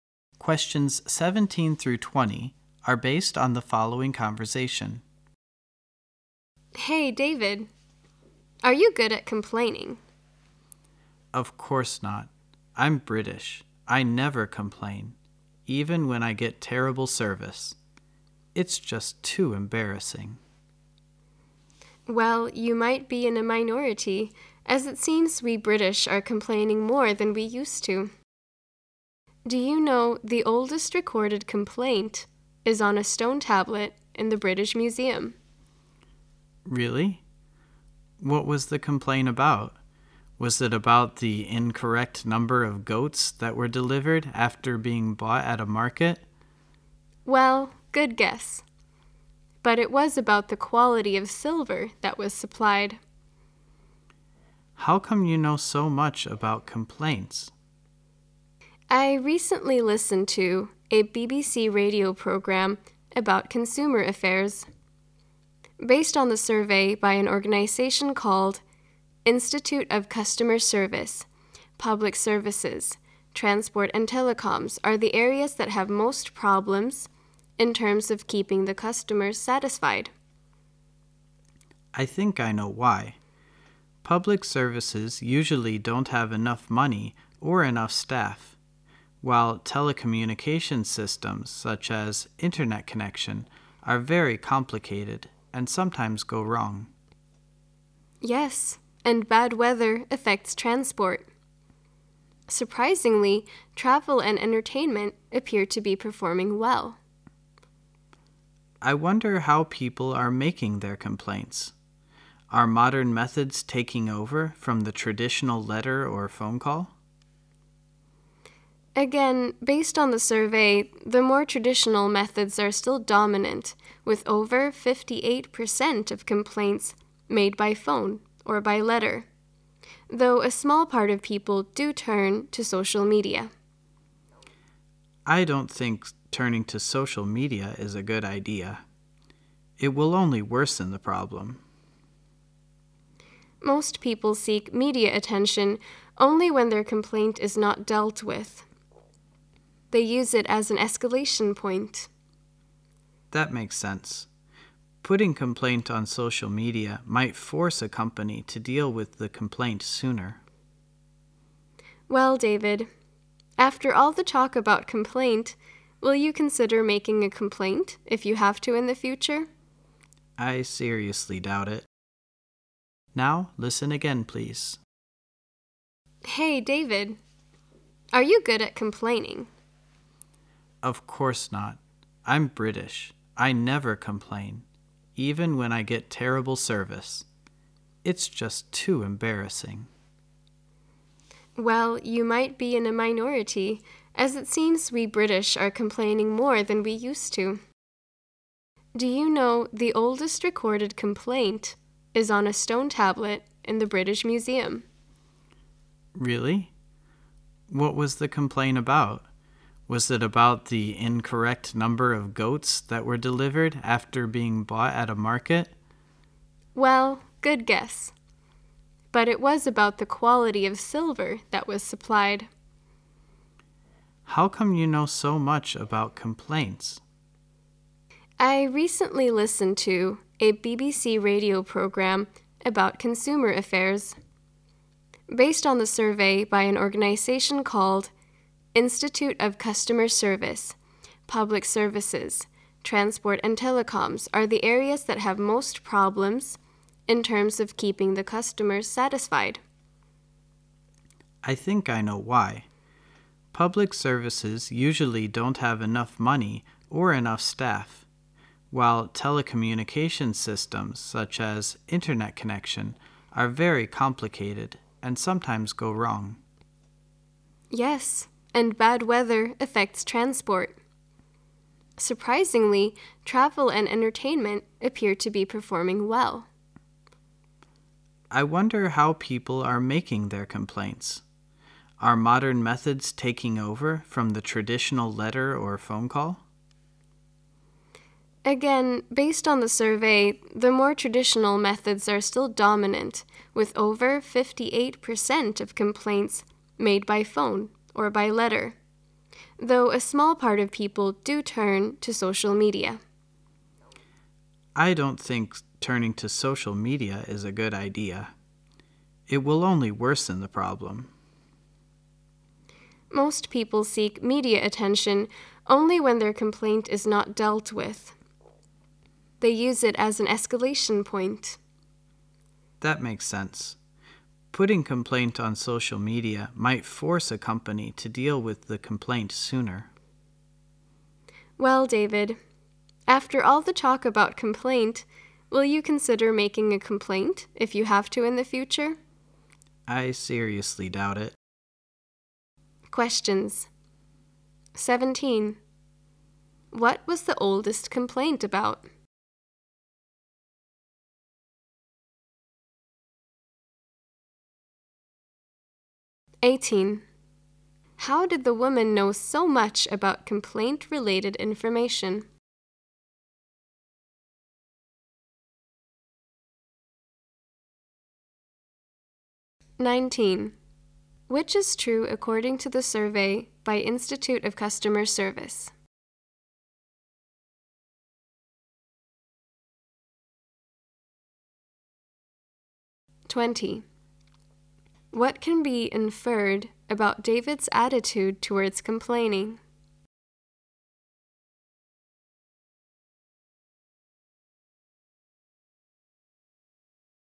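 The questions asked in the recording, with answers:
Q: What was the oldest complaint about?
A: The quality of silver supplied

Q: How did the woman know so much about complaint-related information?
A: From a BBC radio program about consumer affairs

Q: What can be inferred about David's attitude towards complaining?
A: He is still unwilling to complain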